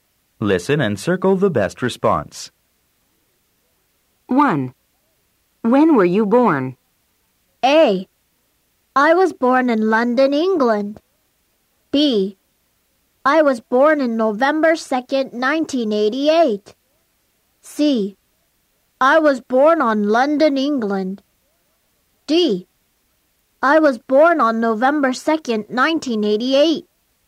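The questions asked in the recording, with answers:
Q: When were you born?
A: D: I was born on November 2nd, 1988.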